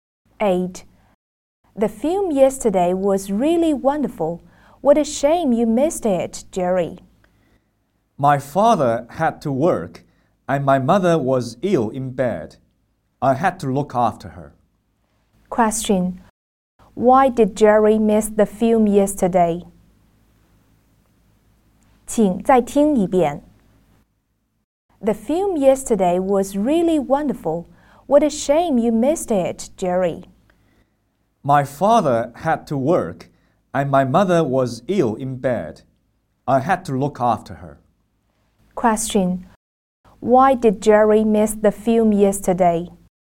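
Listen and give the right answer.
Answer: He had to look after his sick mother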